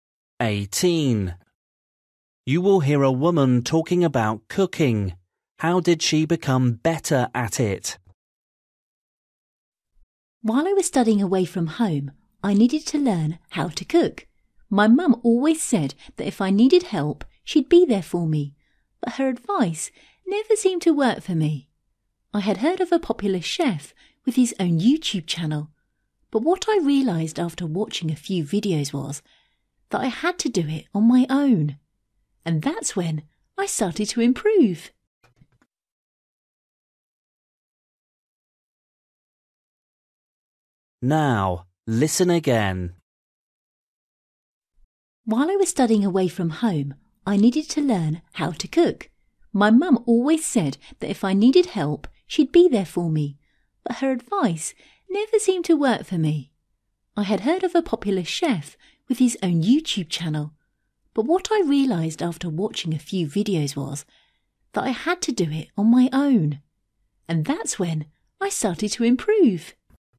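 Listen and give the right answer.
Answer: By doing it on her own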